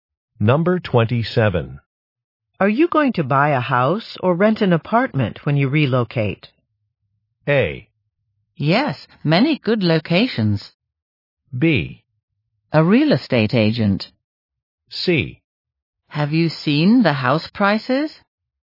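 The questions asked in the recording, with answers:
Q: Are you going to buy a house or rent an apartment when you relocate?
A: C: Have you seen the house prices?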